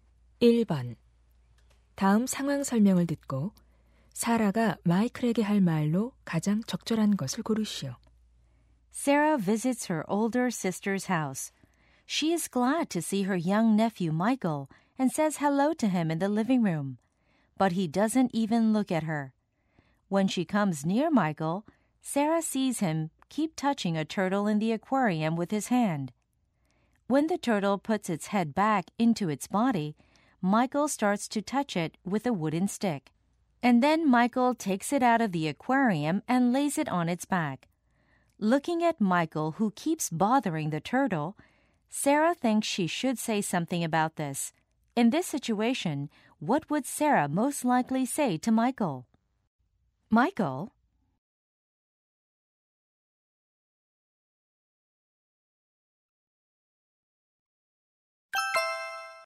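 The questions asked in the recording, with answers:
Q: In this situation, what would Sarah most likely say to Michael?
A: Michael, stop bothering the turtle; you shouldn't treat animals like that.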